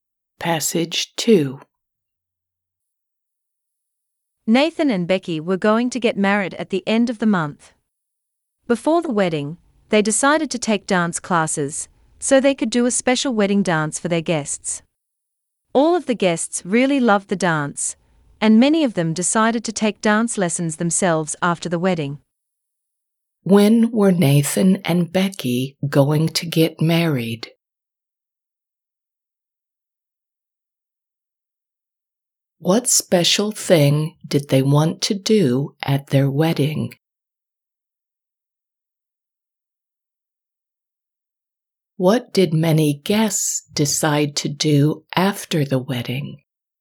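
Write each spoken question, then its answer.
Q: When were Nathan and Becky going to get married?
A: At the end of the month

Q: What special thing did they want to do at their wedding?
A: A special wedding dance

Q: What did many guests decide to do after the wedding?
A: Take dance lessons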